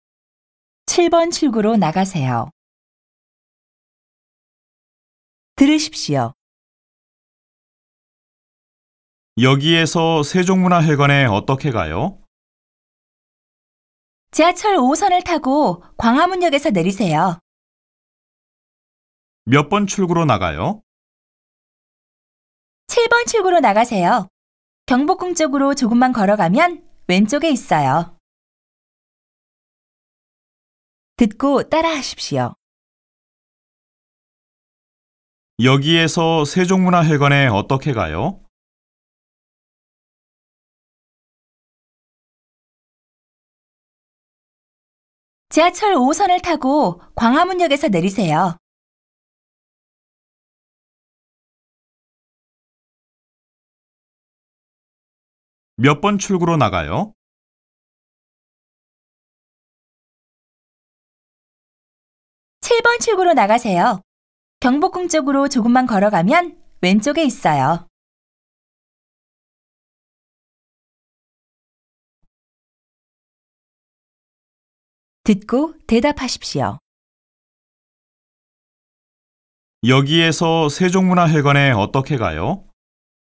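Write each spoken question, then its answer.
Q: 여기에서 세종문화회관에 어떻게 가요?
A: 지하철 5호선을 타고 광화문역에서 내리세요.

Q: 몇 번 출구로 나가요?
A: 7번 출구로 나가세요.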